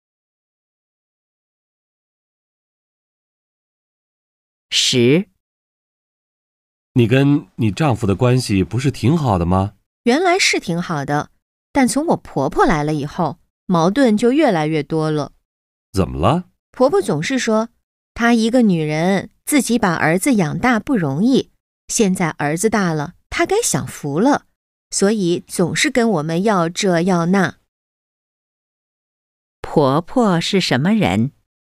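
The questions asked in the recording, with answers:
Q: 婆婆是什么人?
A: 自己一个人把儿子养大的女人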